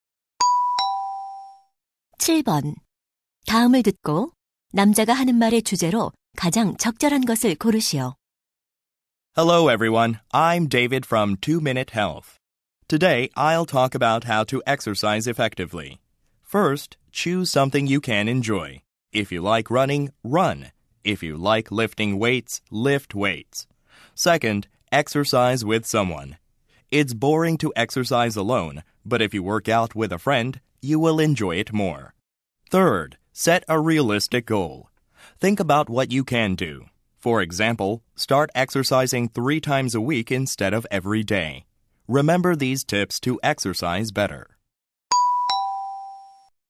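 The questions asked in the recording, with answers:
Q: 다음을 듣고 남자가 하는 말의 주제로 가장 적절한 것을 고르시오.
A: 효과적으로 운동하는 방법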